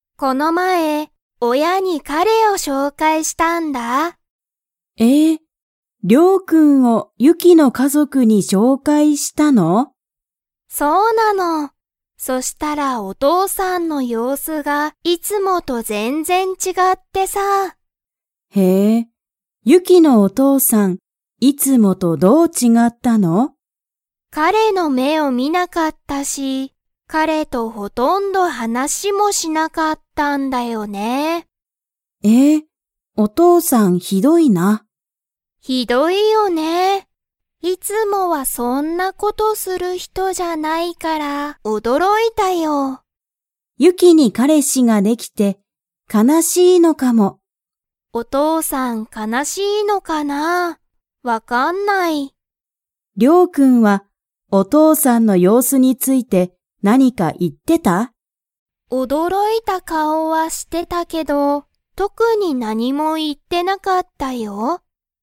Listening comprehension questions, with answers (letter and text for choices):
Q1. ユキは、親おやに誰だれを紹介しょうかいしましたか?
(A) 先生せんせい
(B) 友達ともだち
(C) 彼女かのじょ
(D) 彼かれ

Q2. リョウは、親おやと 。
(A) 普通ふつうに話はなした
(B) 全然ぜんぜん話はなさなかった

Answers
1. (D) 彼かれ
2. (A) 普通ふつうに話はなした

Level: Level 3